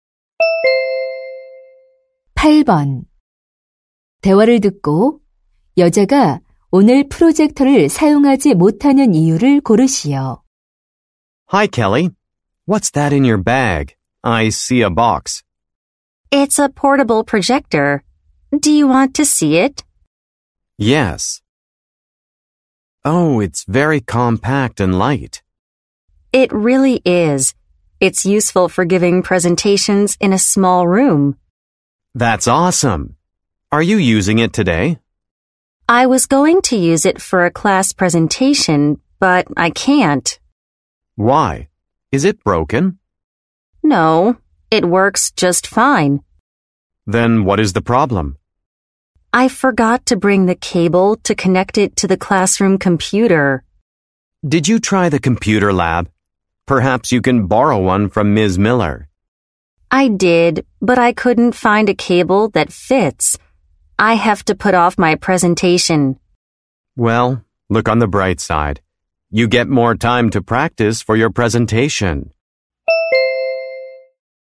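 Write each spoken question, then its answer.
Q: 대화를 듣고 여자가 오늘 프로젝터를 사용하지 못하는 이유를 고르시오.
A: 컴퓨터 연결 케이블을 가져오지 않아서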